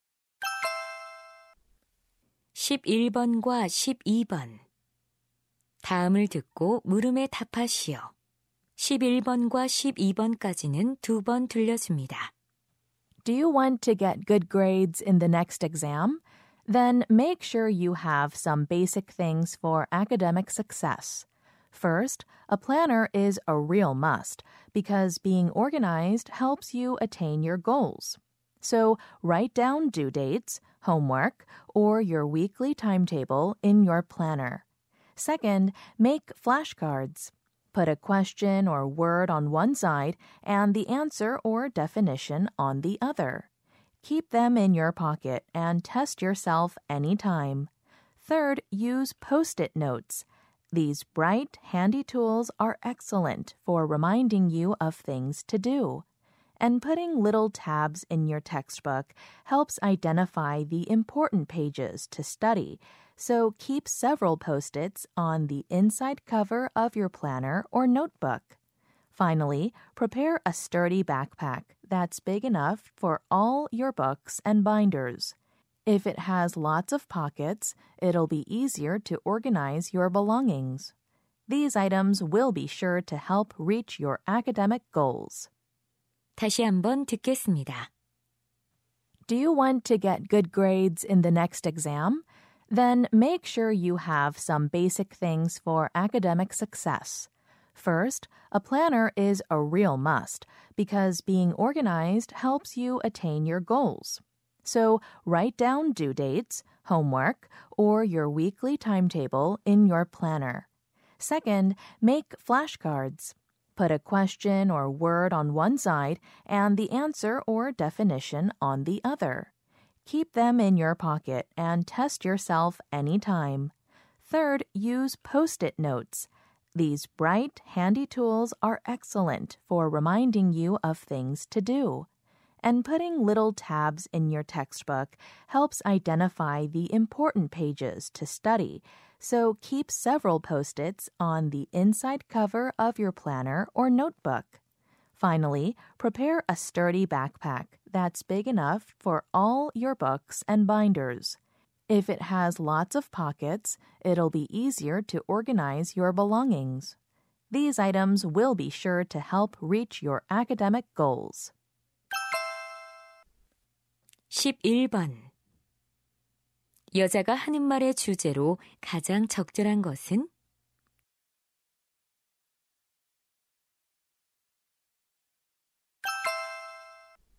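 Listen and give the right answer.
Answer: 학업 성공을 위해 필요한 기본 물품들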